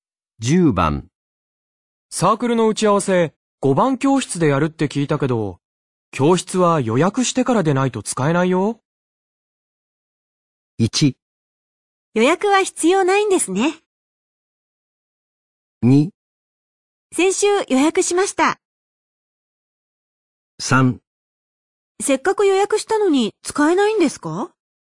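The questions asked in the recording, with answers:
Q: サークルの打ち合わせ、5番教室でやるって聞いたけど、教室は予約してからでないと使えないよ。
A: 2: 先週予約しました。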